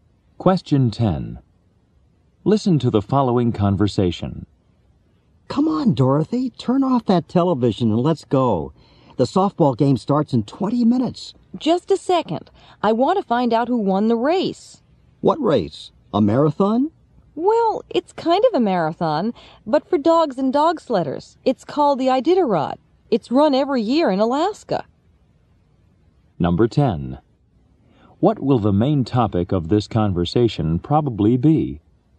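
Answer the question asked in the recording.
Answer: The Iditarod, a sled dog race in Alaska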